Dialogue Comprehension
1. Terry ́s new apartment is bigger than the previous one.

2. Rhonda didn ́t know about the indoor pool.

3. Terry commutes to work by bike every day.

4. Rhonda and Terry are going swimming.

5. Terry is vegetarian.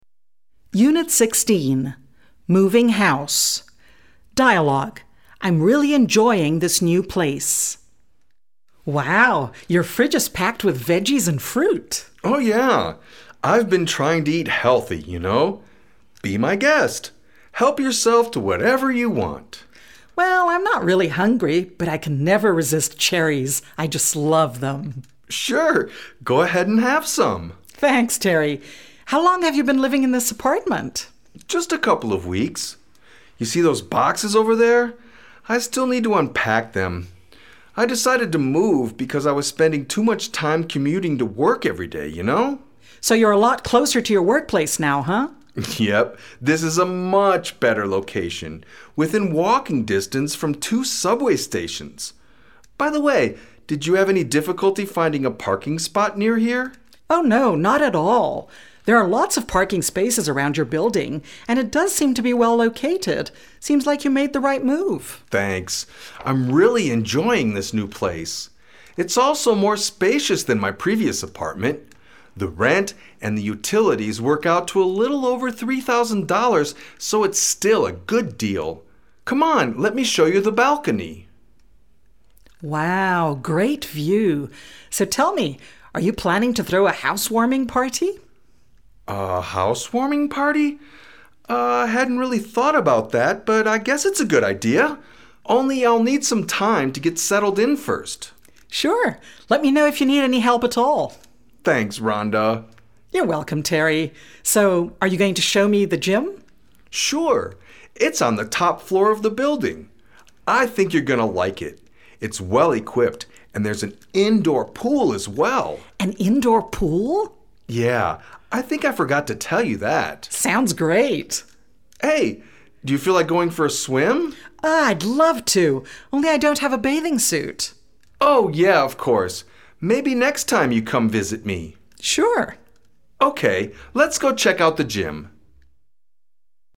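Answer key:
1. True
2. True
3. I don ́t know
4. False
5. I don ́t know

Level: B2-level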